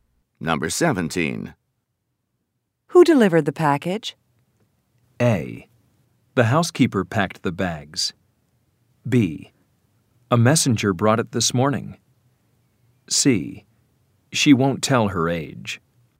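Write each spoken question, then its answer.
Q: Who delivered the package?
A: B: A messenger brought it this morning.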